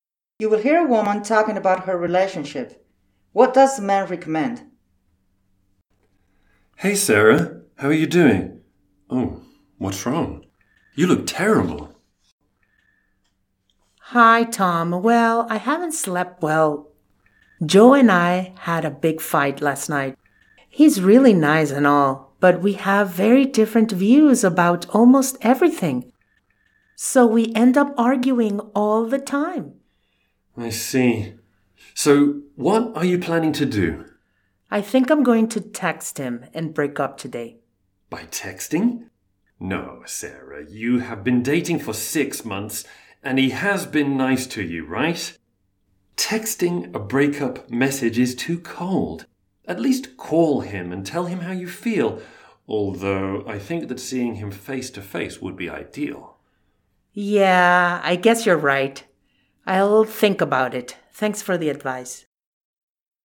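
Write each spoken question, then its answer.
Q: What does the man recommend?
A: That she at least call Joe rather than text him, and ideally break up with him face to face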